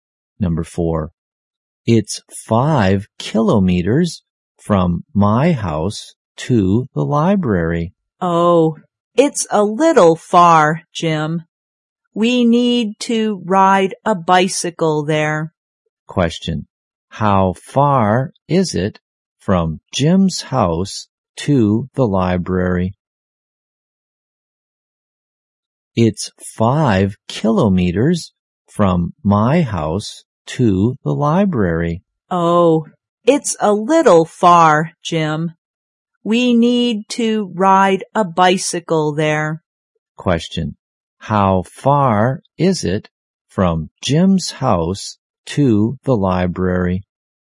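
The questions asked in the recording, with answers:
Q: How far is it from Jim's house to the library?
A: 5 kilometers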